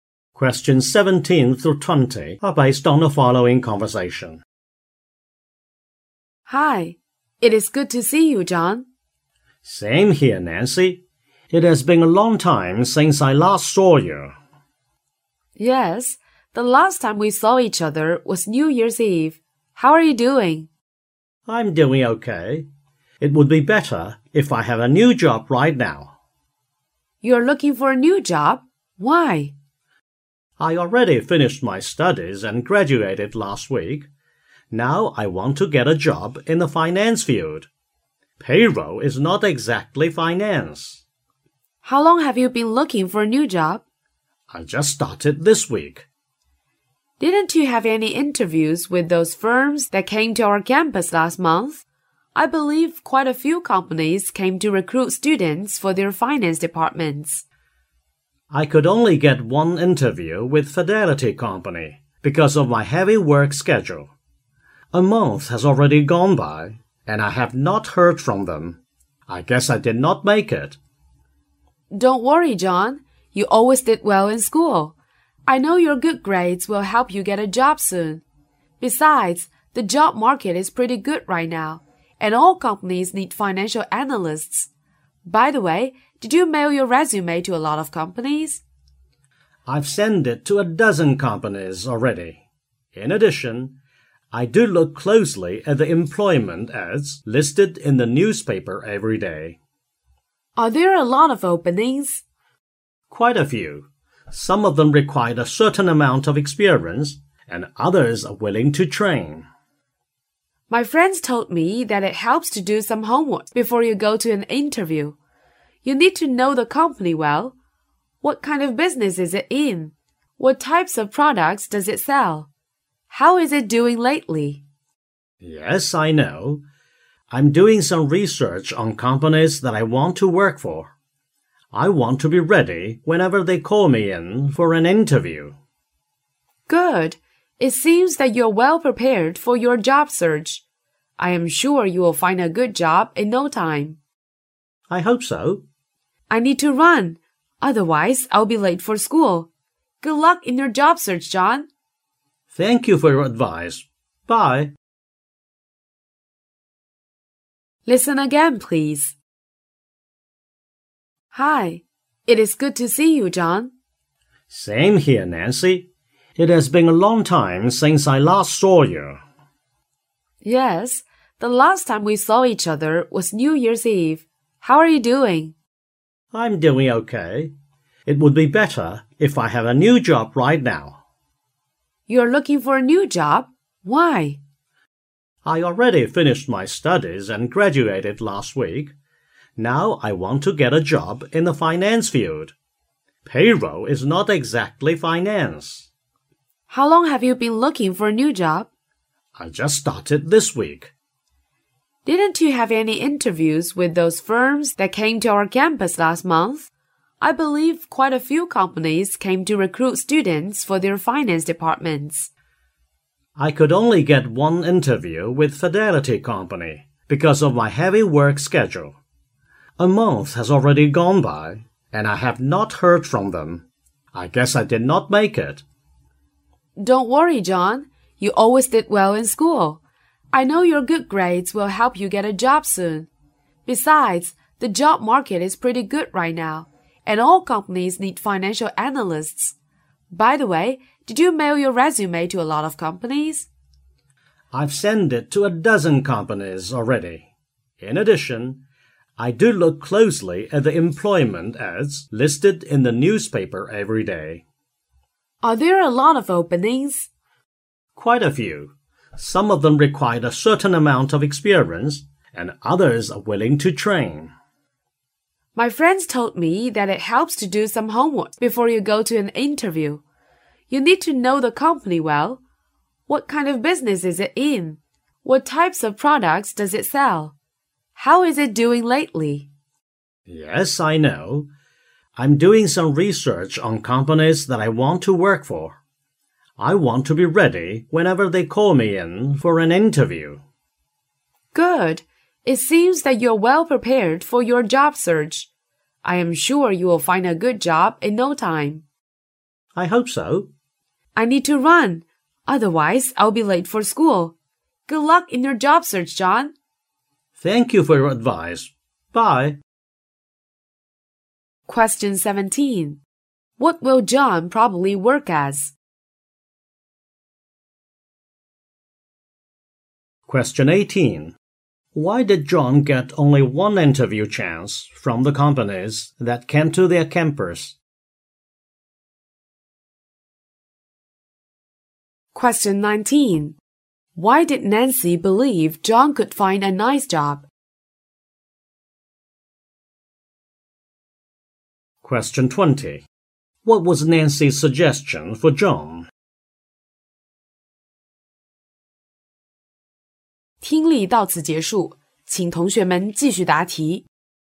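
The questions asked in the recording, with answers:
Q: Why did John get only one interview chance from the companies that came to their campus?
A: Because of his heavy work schedule

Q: Why did Nancy believe John could find a nice job?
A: He has good grades, and the job market is good.

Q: What was Nancy's suggestion for John?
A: To research the company before an interview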